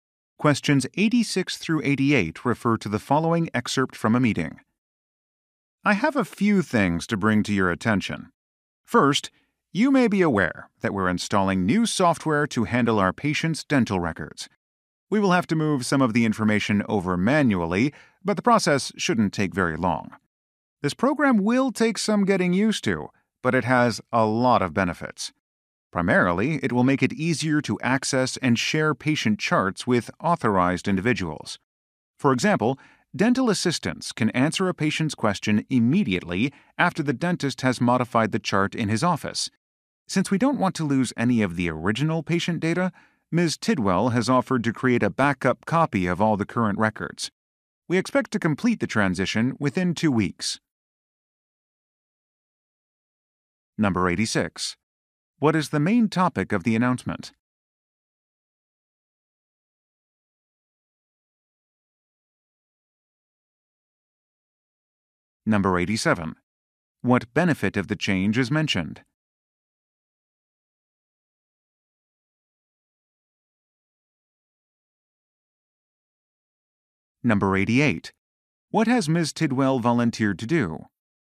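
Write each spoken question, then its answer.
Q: What is the main topic of the announcement?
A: New software for patient records

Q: What benefit of the change is mentioned?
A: Easier access and sharing of patient charts

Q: What has Ms. Tidwell volunteered to do?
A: Create a backup copy of the current records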